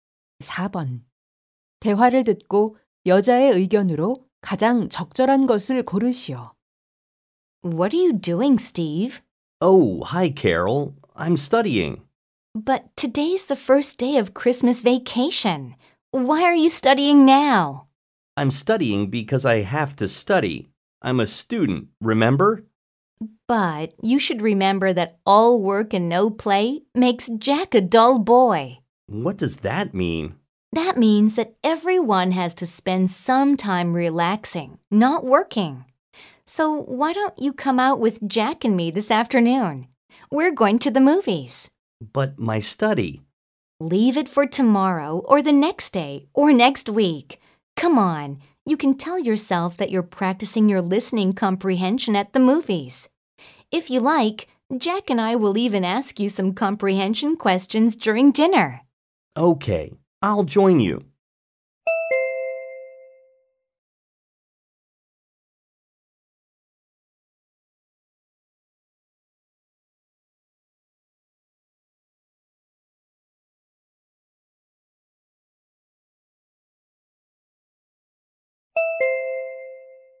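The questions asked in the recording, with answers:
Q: 대화를 듣고 여자의 의견으로 가장 적절한 것을 고르시오.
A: 공부만 하지 말고 적당히 휴식을 취해야 한다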